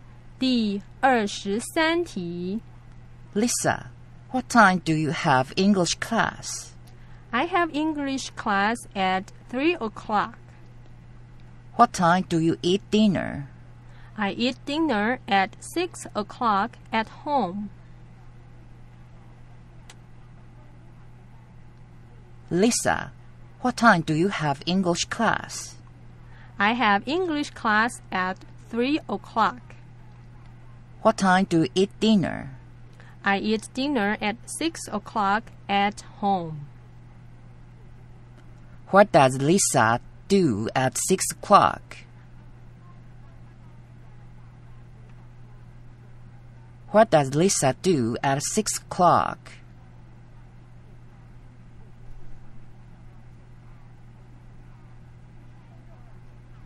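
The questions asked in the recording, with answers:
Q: What does Lisa do at 6 o'clock?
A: She eats dinner at home.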